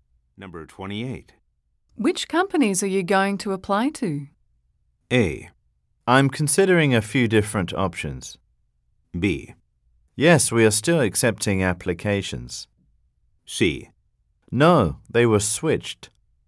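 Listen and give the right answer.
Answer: A: I'm considering a few different options.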